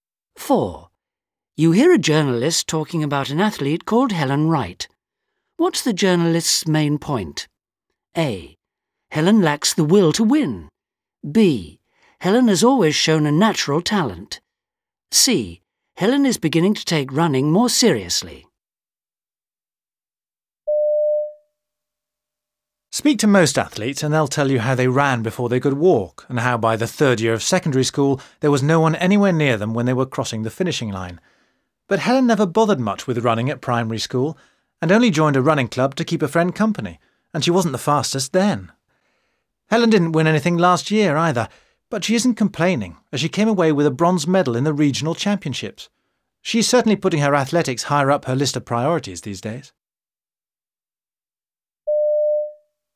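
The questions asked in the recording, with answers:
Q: What's the journalist's main point?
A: C: Helen is beginning to take running more seriously.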